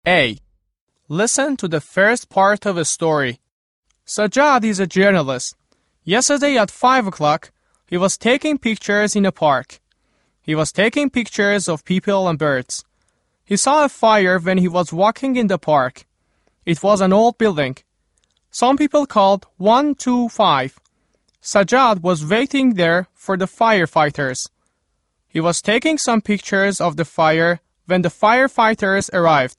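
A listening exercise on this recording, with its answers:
۱. Fill in the blanks based on what you just heard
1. .......................Sajjad was taking pictures yesterday at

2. ............................When he was taking pictures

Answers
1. 5 o'clock in a park
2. he saw a fire

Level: زبان دهم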